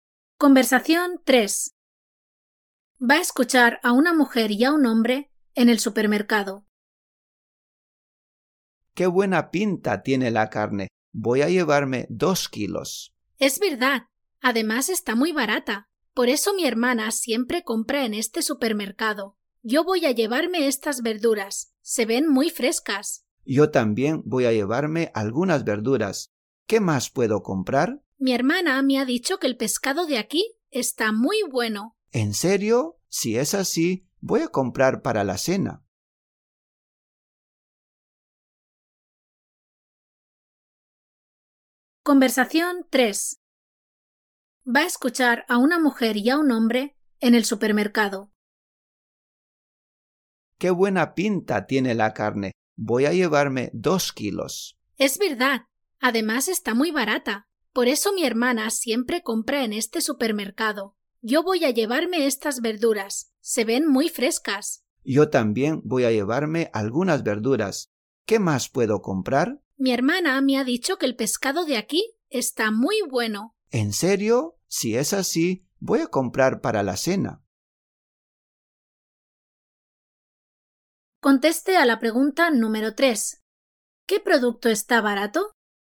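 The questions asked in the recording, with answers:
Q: ¿Qué producto está barato?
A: La carne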